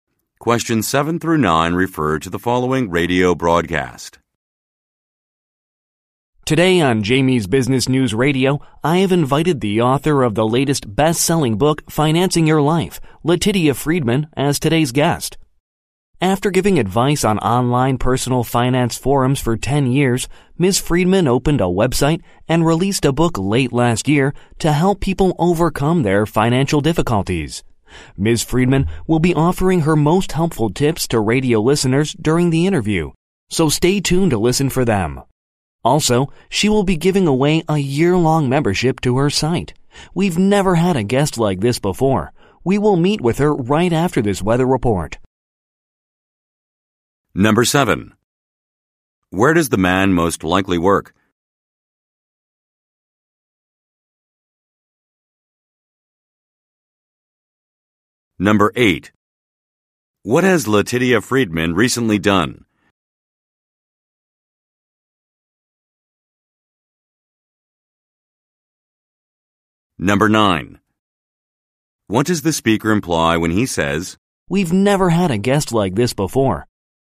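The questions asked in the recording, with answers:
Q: Where does the man most likely work?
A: At a radio station

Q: What has Letitia Friedman recently done?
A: Released a book and opened a website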